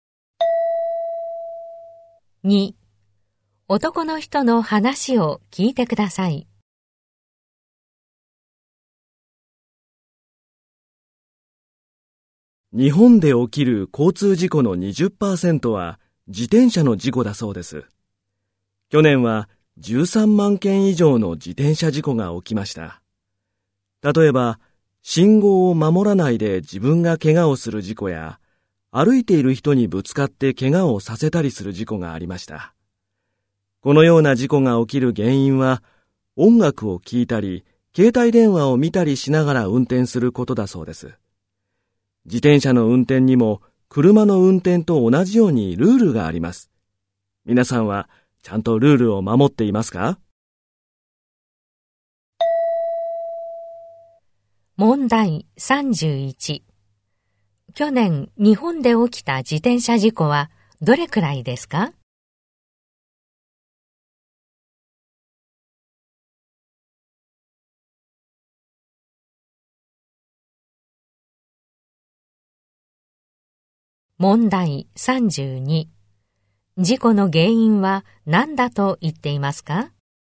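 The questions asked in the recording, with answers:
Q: 去年、日本で起きた自転車事故はどれくらいですか?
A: 13万件以上

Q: 事故の原因は何だと言っていますか?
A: 音楽を聴いたり携帯電話を見たりしながら運転すること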